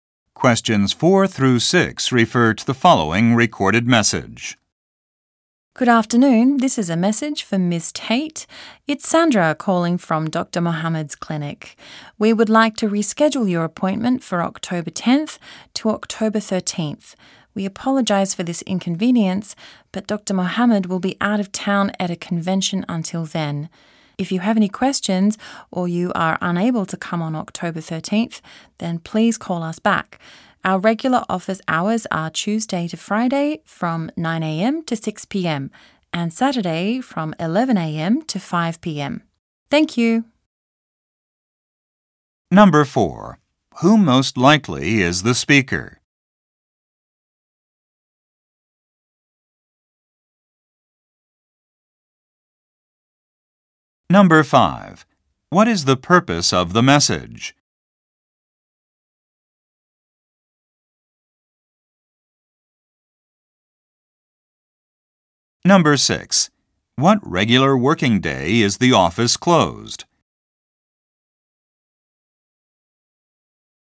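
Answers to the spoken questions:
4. A clinic receptionist
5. To reschedule an appointment
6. Monday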